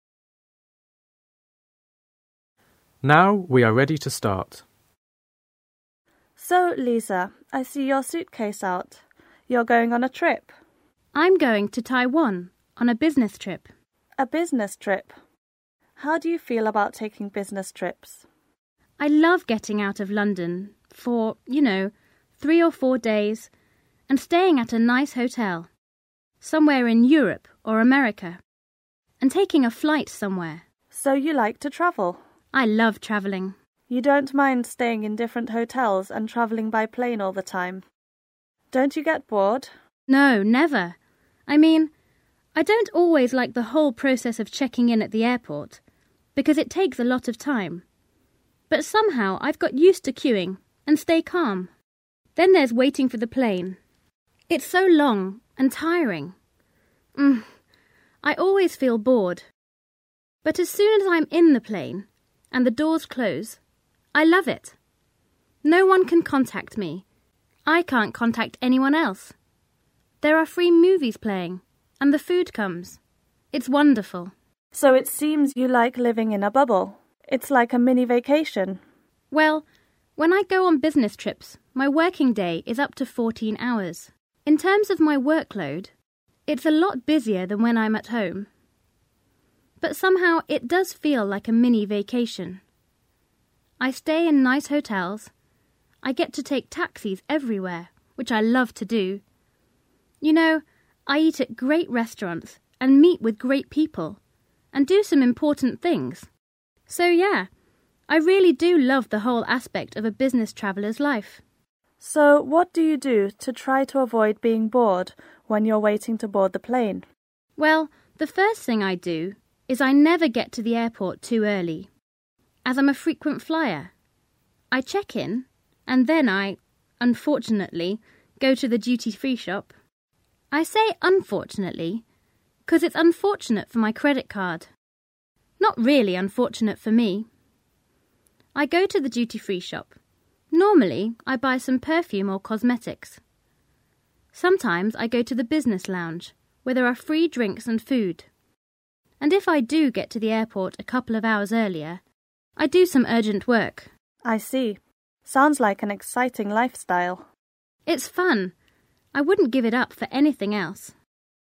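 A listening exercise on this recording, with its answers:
Вы услышите диалог. Определите, какие из приведённых утверждений А–G соответствуют содержанию текста (1 – True), какие не соответствуют (2 – False) и о чём в тексте не сказано, то есть на основании текста нельзя дать ни положительного, ни отрицательного ответа (3 – Not stated). Занесите номер выбранного Вами варианта ответа в таблицу. Вы услышите запись дважды.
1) The job gives Lisa an opportunity to travel abroad.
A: True

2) The check-in process at the airport makes Lisa nervous.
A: False

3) When on business trips Lisa doesn't have to work long hours.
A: False

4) On her business trips Lisa signs a lot of important contracts.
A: Not stated

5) Lisa spends a lot of money in duty-free shops.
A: True

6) There is a computer in the business lounge for passengers who want to do some urgent work.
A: Not stated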